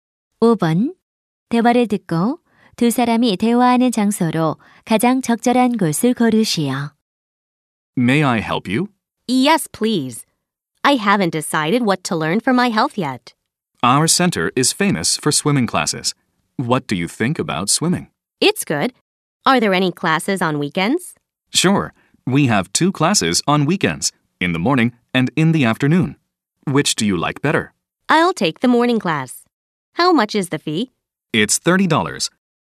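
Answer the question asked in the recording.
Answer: 스포츠 센터(수영장)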